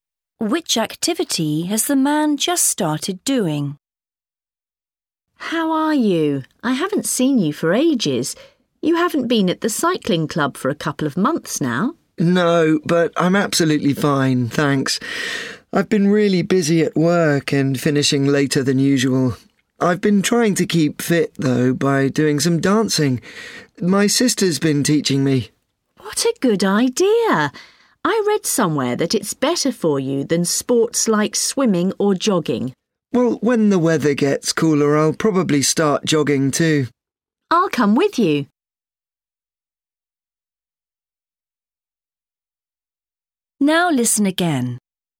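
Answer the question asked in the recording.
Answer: dancing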